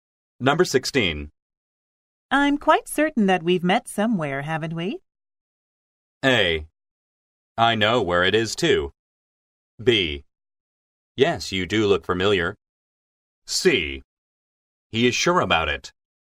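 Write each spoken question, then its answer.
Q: I'm quite certain that we've met somewhere, haven't we?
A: B: Yes, you do look familiar.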